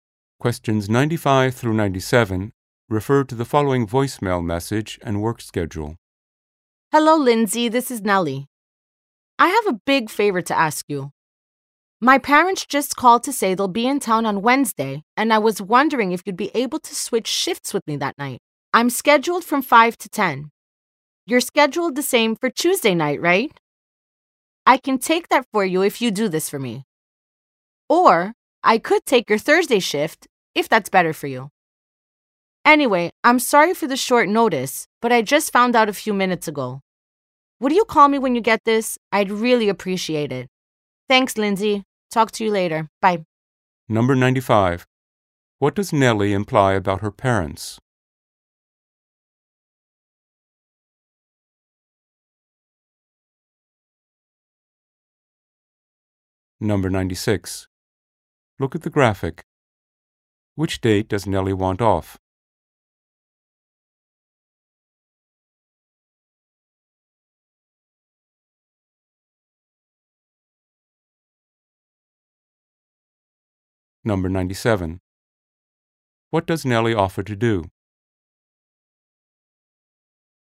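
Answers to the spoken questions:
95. They are coming to town on Wednesday
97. Take Lindsay's Tuesday or Thursday shift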